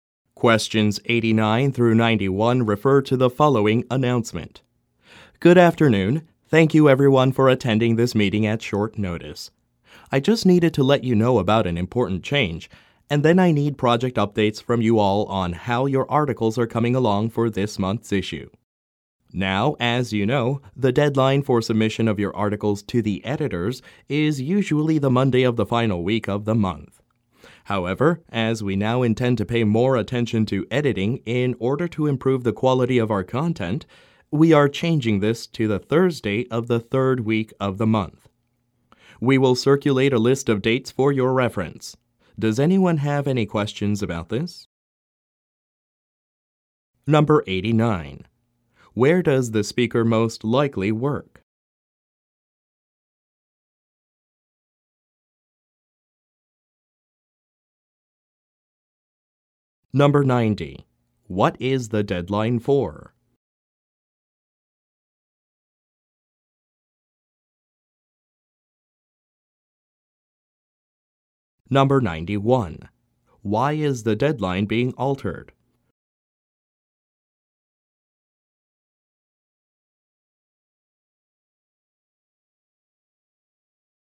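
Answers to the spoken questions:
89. At a magazine publisher
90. Submitting articles to the editors
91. To allow more time for editing to improve content quality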